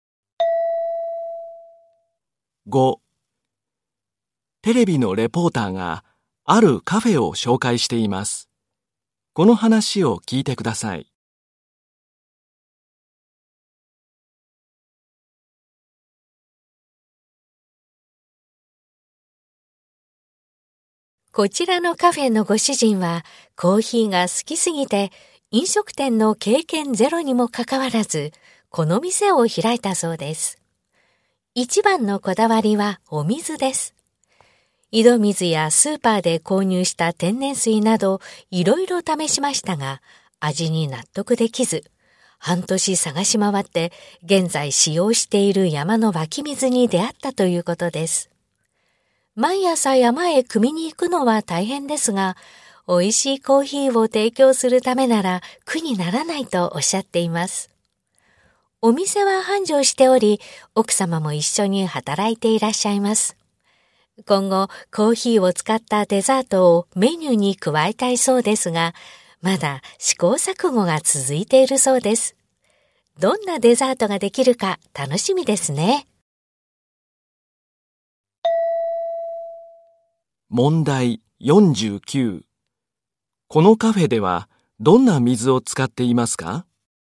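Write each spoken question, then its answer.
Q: このカフェではどんな水を使っていますか?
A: 山の湧き水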